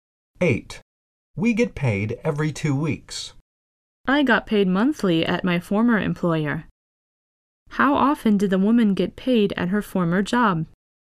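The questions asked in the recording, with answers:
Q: How often did the woman get paid at her former job?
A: Monthly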